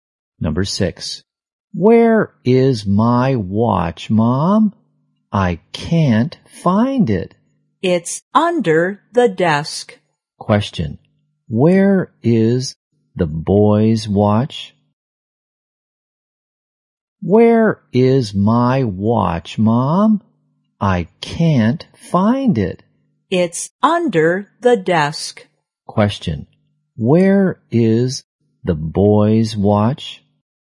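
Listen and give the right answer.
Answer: Under the desk.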